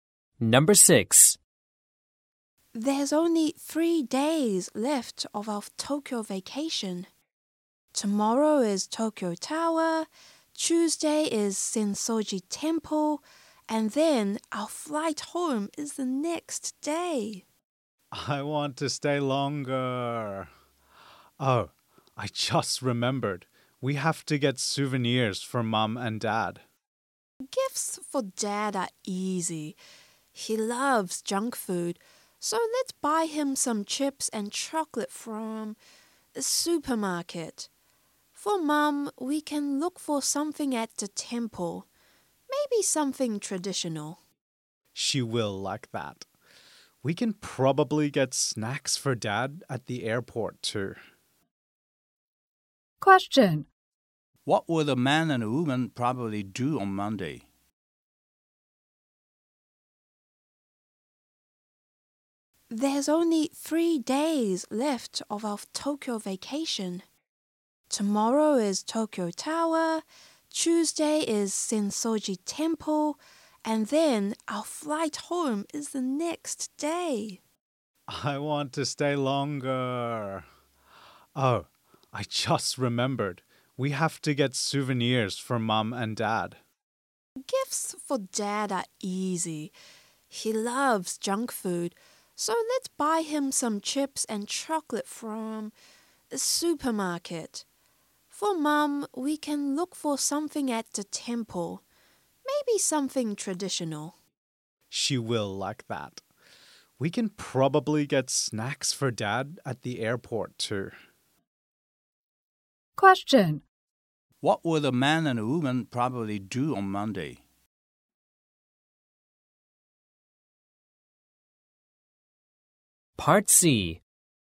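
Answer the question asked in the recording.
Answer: Visit Tokyo Tower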